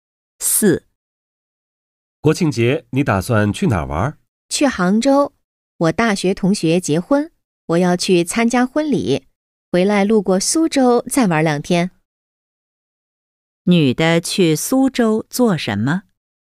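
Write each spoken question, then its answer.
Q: 女的去苏州做什么?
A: 游玩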